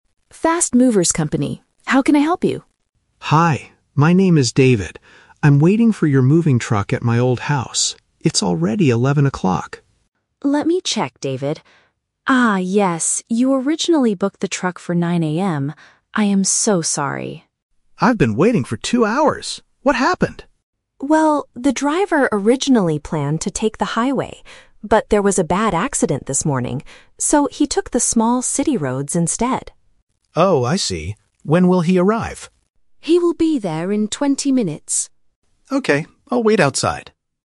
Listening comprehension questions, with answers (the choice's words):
Listen to a telephone conversation between a customer and a moving company agent. For each question, choose the correct answer (A, B, or C).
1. What time did David originally want the moving truck to arrive?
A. At 9:00 AM.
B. At 11:00 AM.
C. In 20 minutes.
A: At 9:00 AM.

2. Why is David calling the company?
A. To book a truck for tomorrow.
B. To report a bad car accident.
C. To complain that the truck is late.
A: To complain that the truck is late.

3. Which road did the truck driver take?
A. The highway.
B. The small city roads.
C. The mountain roads.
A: The small city roads.

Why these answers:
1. The agent confirms, "You originally booked the truck for 9:00 AM" (Option A - Key). Option B (11 o'clock) is a trap because that is the current time, not the original booking time. Option C is a trap because 20 minutes is when the truck will arrive in the future.
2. David says he has been "waiting for two hours" and asks "What happened?", which means he is complaining that the truck is late (Option C - Key). Option A is a plausible reason to call a moving company, but it is not mentioned. Option B is a trap because the agent mentions an accident, but David is not calling to report it.
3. The agent says the driver "originally planned to take the highway" (Option A - Trap). However, because of an accident, he "took the small city roads instead" (Option B - Key). Option C is not mentioned in the audio at all.

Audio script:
Agent: Fast Movers Company. How can I help you?
David: Hi. My name is David. I'm waiting for your moving truck at my old house. It's already 11 o'clock!
Agent: Let me check, David. Ah, yes. You originally booked the truck for 9:00 AM. I am so sorry.
David: I've been waiting for two hours! What happened?
Agent: Well, the driver originally planned to take the highway. But, there was a bad accident this morning. So, he took the small city roads instead.
David: Oh, I see. When will he arrive?